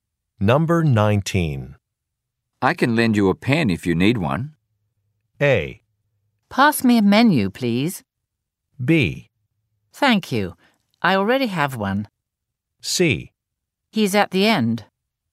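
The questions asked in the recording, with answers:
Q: I can lend you a pen if you need one.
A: B: Thank you. I already have one.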